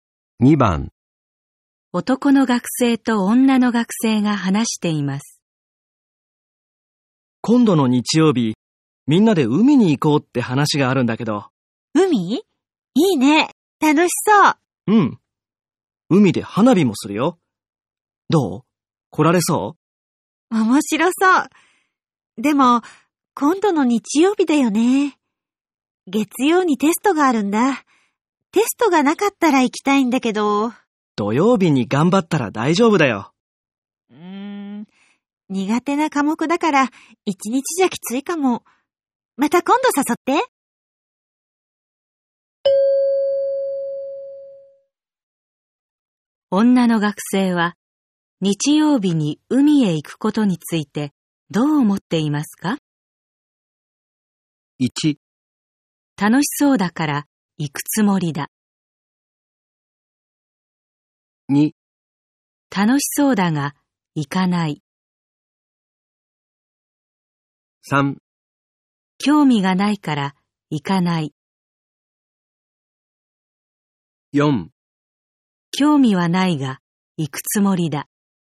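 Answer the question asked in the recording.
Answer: 2: 楽しそうだが行かない。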